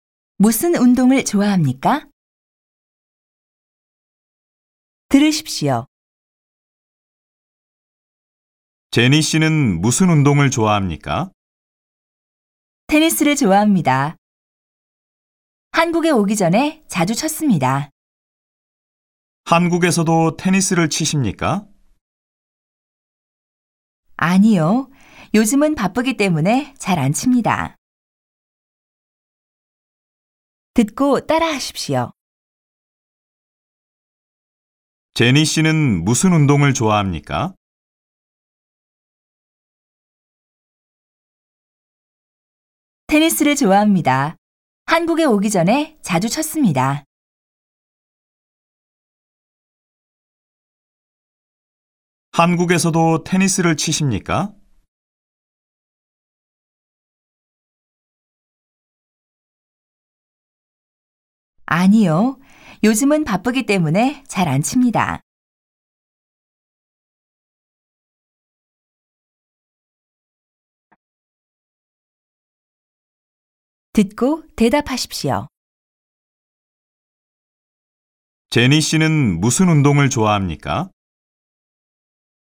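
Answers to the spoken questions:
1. 테니스를 좋아합니다.
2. 아니요. 요즘은 바쁘기 때문에 잘 안 칩니다.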